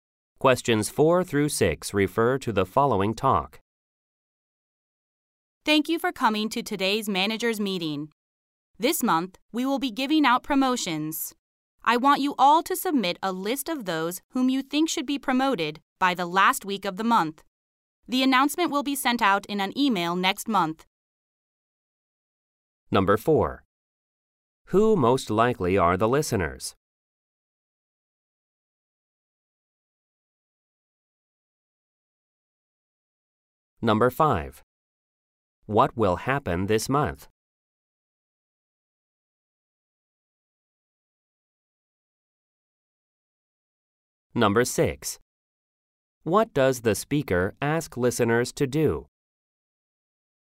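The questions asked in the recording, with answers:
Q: Who most likely are the listeners?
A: Managers

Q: What will happen this month?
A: Promotions will be given out

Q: What does the speaker ask listeners to do?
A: Submit a list of people who should be promoted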